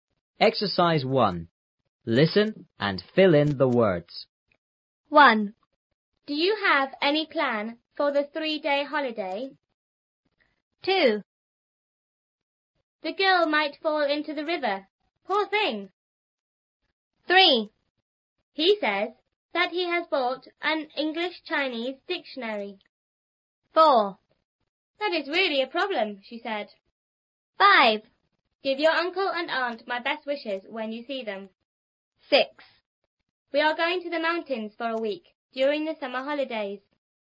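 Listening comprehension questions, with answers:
1.Listen and fill in the words.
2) The girl___ ___into the river.___thing!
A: might fall; Poor

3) He says that he has___an English-Chinese___.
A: bought; dictionary

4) "That is___a___,"she said.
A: really; problem

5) Give your uncle and aunt my___ ___when you see them.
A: best wishes

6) We are going to the___for a week___the summer holidays.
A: mountains; during

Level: 初中英语广州版3B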